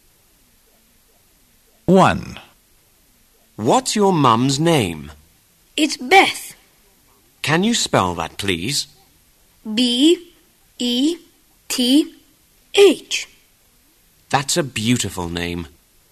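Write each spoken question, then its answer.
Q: What's your mum's name?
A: Beth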